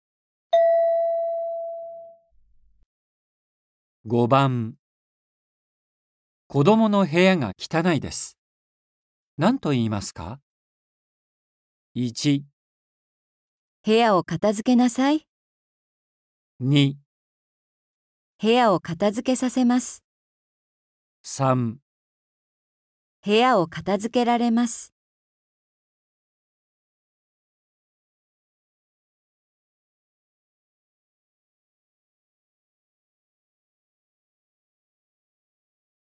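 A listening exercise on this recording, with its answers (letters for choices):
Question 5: 子どもの部屋が汚いです。何と言いますか。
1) 部屋を片付けなさい。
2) 部屋を片付けさせます。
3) 部屋を片付けられます。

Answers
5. 1

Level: N4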